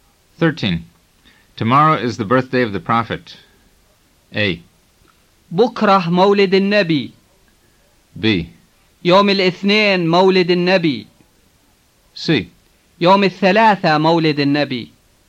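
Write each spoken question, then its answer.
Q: Tomorrow is the birthday of the Prophet.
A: A: بكرة مولد النبي.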